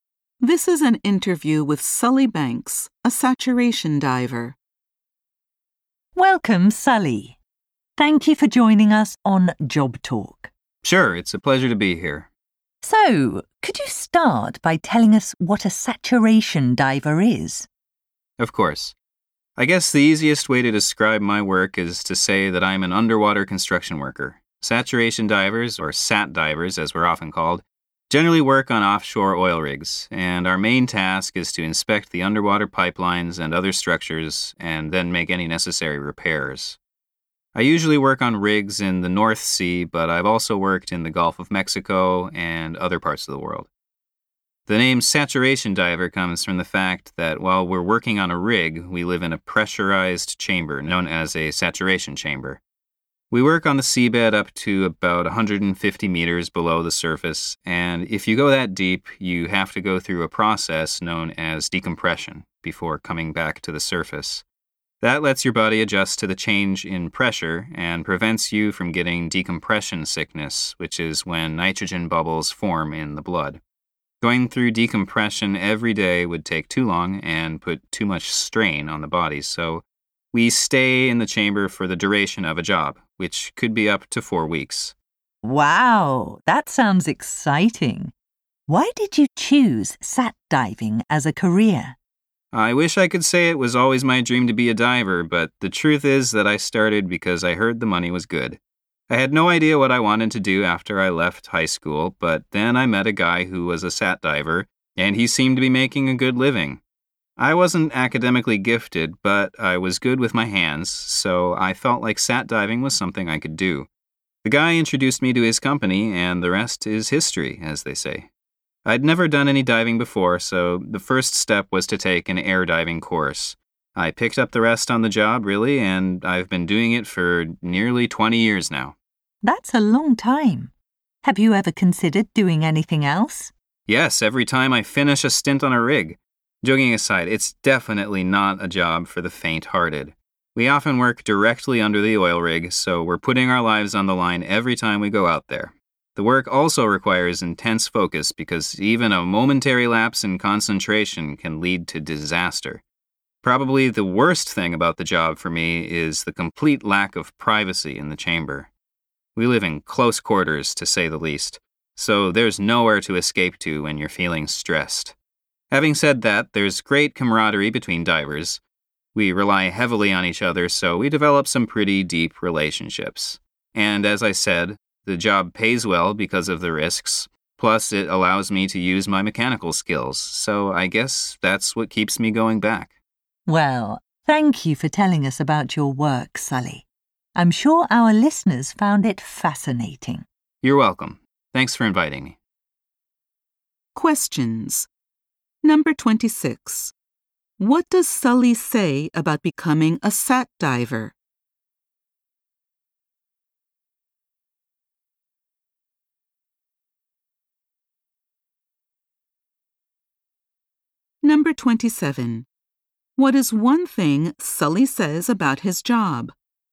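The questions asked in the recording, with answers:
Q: What does Sully say about becoming a SAT diver?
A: He started mainly because he heard the money was good, even though he had never dived before.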